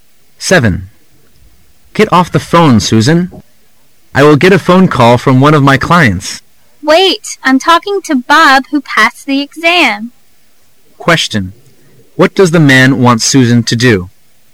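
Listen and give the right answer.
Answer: Get off the phone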